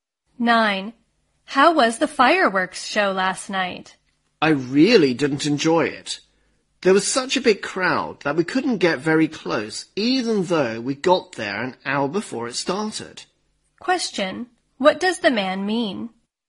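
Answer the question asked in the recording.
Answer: The crowd was too big to get close, so he didn't enjoy the show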